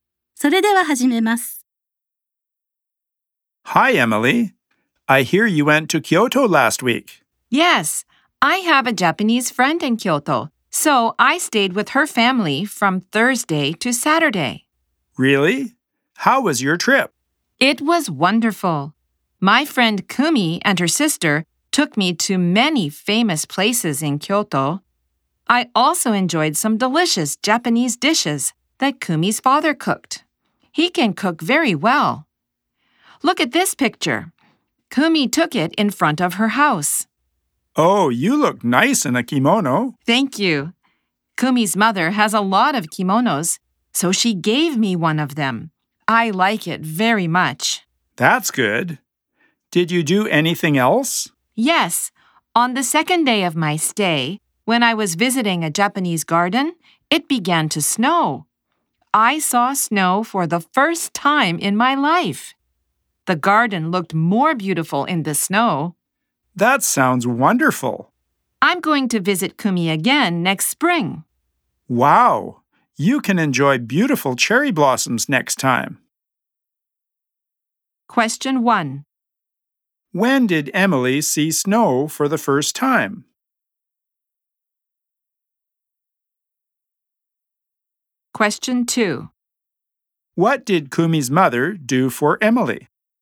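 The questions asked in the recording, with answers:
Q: When did Emily see snow for the first time?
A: On the second day of her stay in Kyoto (Friday), while visiting a Japanese garden.

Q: What did Kumi's mother do for Emily?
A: She gave Emily one of her kimonos.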